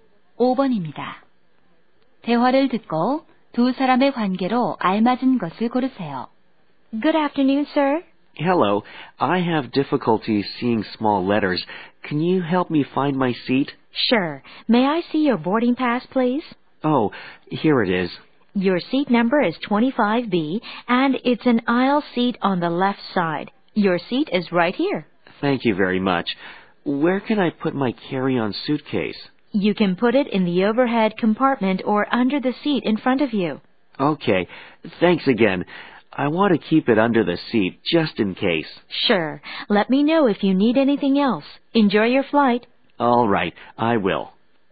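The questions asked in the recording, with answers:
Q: 대화를 듣고 두 사람의 관계로 알맞은 것을 고르세요.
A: 승무원과 승객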